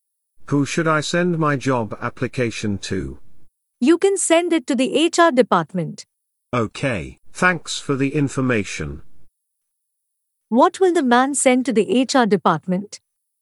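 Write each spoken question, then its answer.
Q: What will the man send to the HR department?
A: His job application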